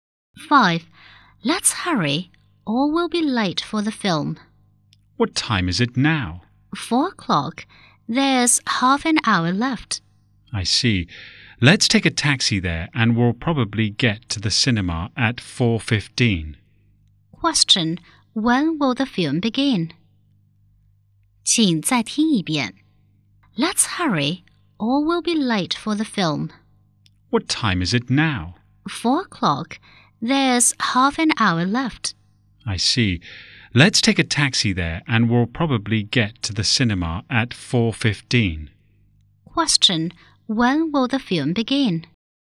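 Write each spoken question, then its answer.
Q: Question, when will the film begin?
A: At 4:30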